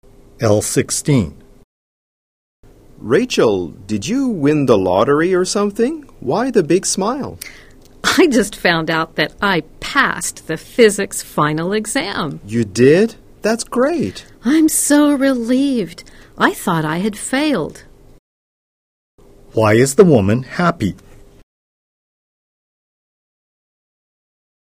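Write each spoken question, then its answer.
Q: Why is the woman happy?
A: She passed the physics final exam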